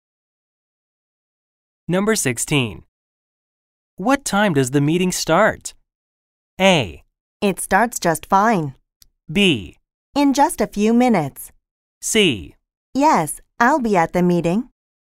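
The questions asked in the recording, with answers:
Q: What time does the meeting start?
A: B: In just a few minutes.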